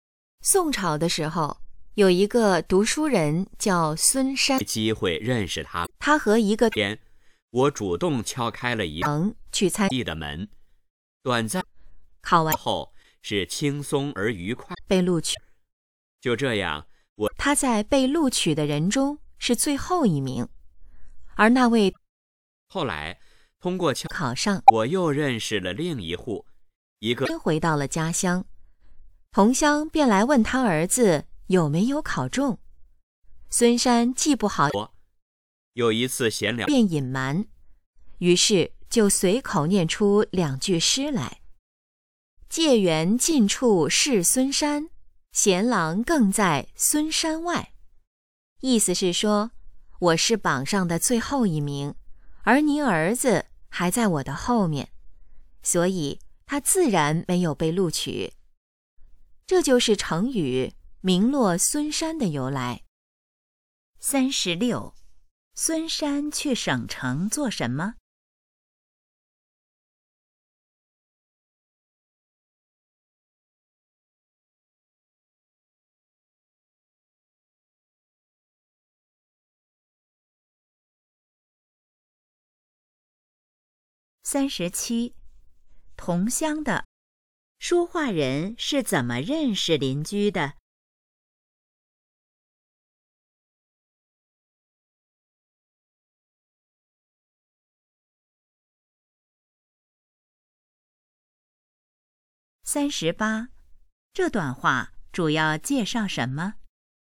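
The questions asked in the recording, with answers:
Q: 这段话主要介绍什么?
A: 成语"名落孙山"的由来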